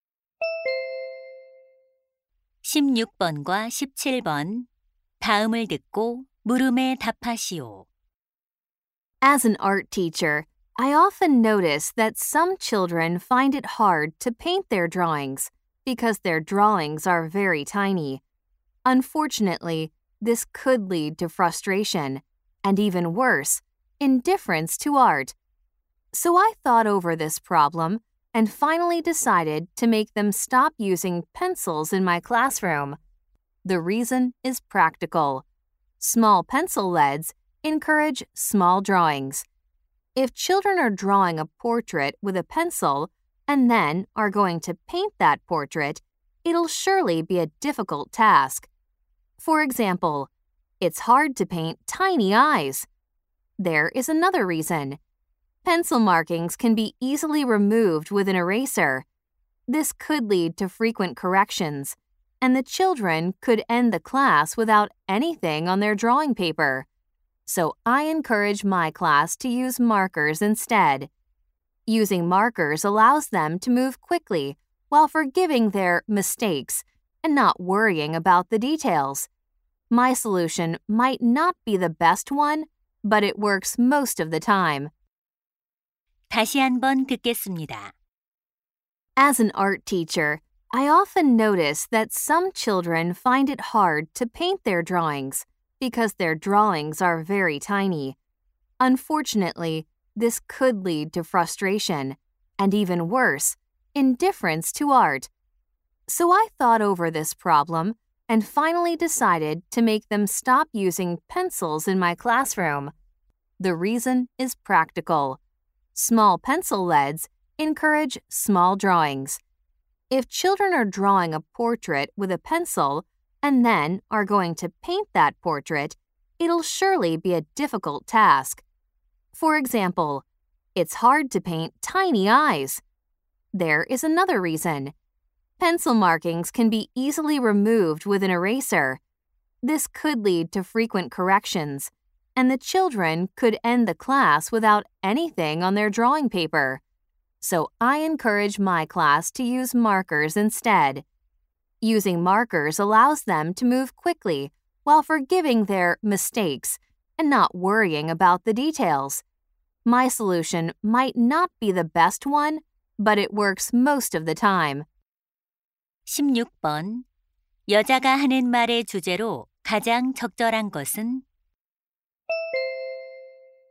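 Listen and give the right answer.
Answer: 미술 수업에서 연필 대신 마커를 사용하게 하는 이유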